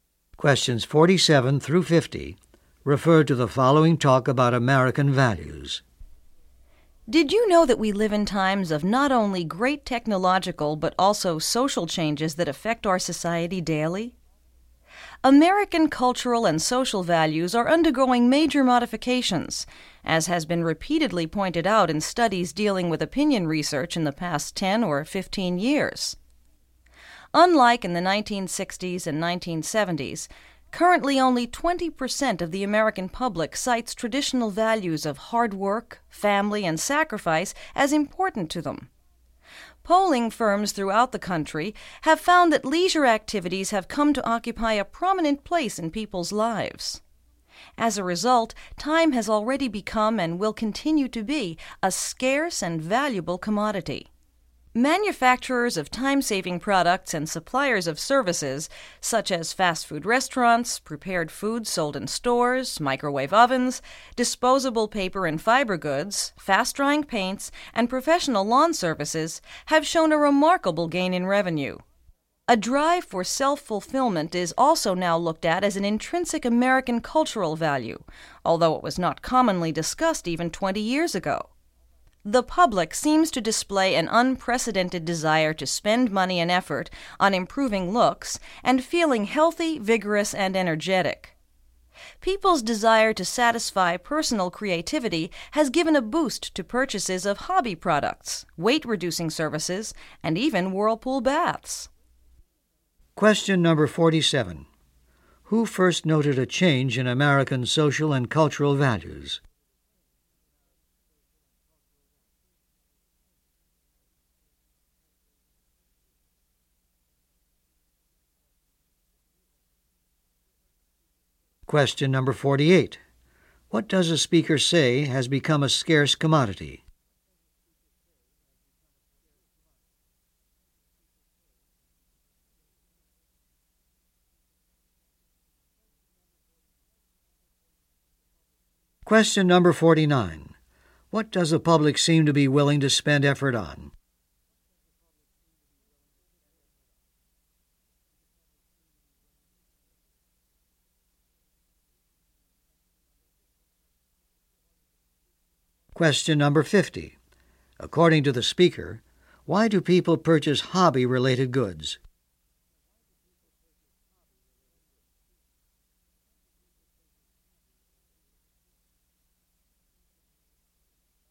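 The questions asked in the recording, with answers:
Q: What does a speaker say has become a scarce commodity?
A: Time

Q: What does the public seem to be willing to spend effort on?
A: Improving looks and feeling healthy

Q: According to the speaker, why do people purchase hobby-related goods?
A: To satisfy personal creativity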